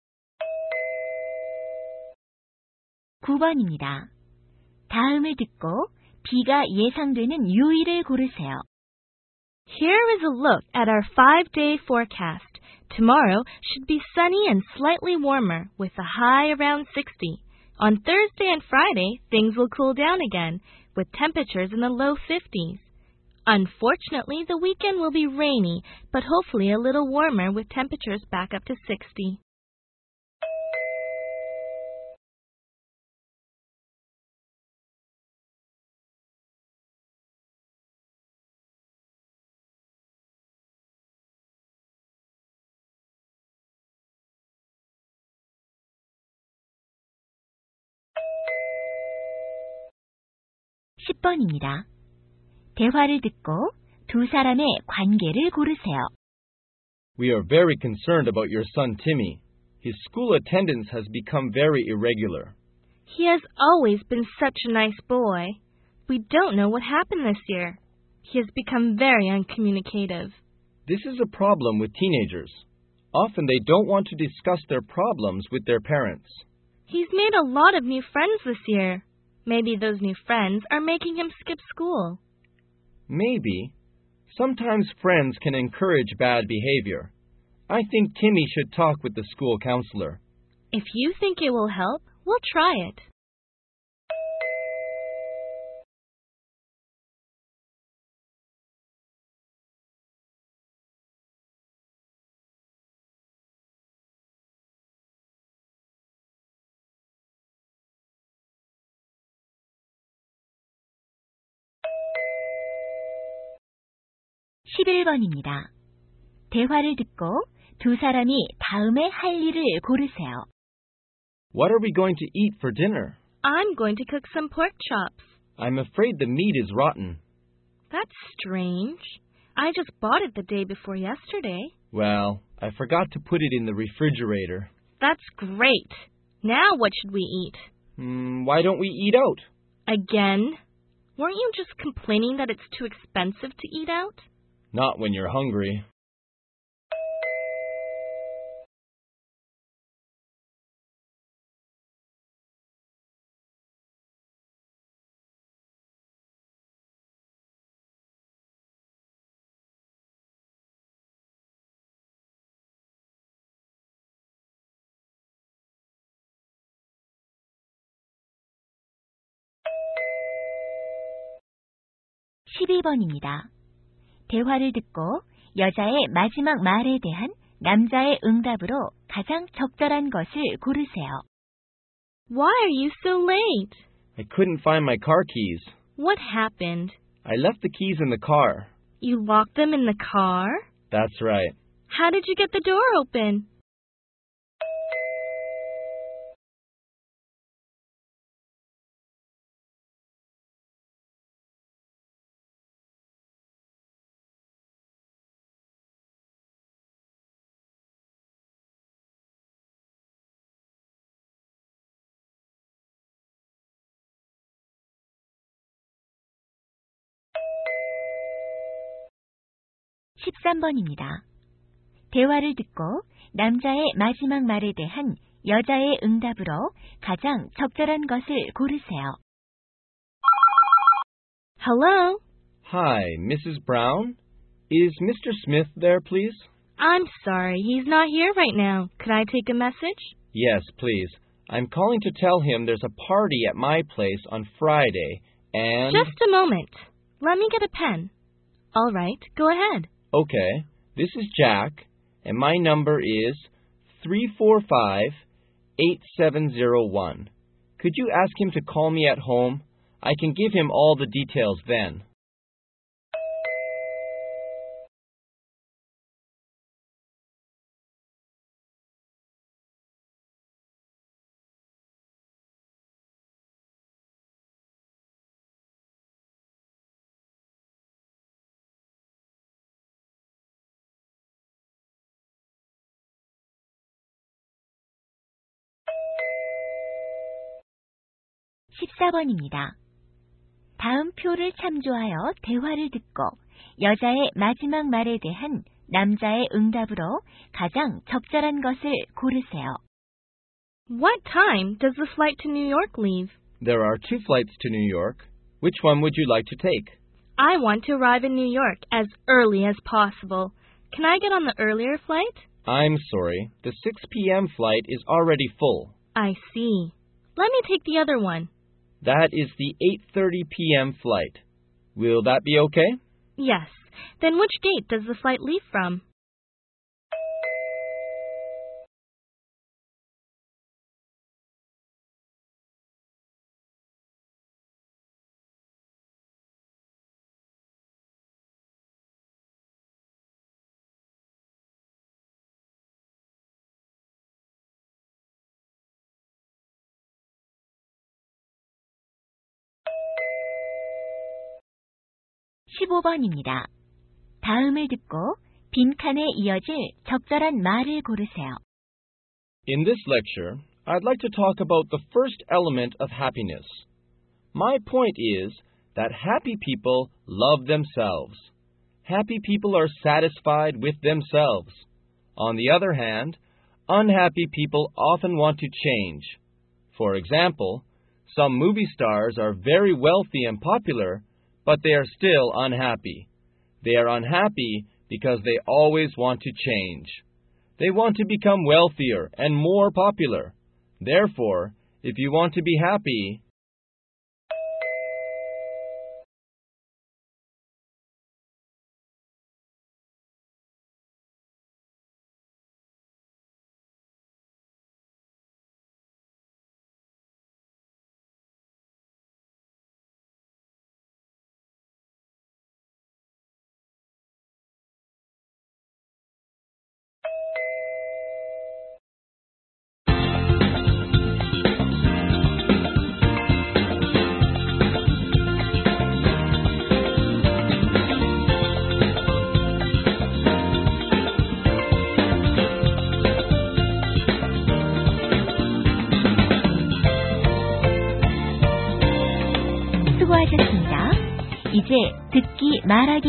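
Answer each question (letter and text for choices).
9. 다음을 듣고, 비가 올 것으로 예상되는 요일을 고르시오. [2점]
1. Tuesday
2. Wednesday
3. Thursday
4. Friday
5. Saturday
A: 5. Saturday

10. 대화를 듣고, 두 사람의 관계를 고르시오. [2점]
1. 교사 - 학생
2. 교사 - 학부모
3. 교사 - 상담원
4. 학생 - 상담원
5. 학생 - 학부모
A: 2. 교사 - 학부모

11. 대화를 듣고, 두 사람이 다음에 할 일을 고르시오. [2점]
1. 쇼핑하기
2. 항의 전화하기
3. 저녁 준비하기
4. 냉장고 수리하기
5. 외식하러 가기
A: 5. 외식하러 가기

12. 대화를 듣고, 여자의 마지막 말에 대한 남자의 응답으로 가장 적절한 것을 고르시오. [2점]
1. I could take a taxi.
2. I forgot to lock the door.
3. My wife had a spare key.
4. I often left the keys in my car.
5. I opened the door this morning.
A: 3. My wife had a spare key.

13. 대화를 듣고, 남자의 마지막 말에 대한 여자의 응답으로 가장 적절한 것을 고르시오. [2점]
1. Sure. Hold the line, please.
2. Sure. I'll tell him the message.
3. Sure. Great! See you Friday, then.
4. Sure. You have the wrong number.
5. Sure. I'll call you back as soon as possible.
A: 2. Sure. I'll tell him the message.

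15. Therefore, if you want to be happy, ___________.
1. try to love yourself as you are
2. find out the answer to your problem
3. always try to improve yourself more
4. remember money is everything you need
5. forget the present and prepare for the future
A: 1. try to love yourself as you are

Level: 고2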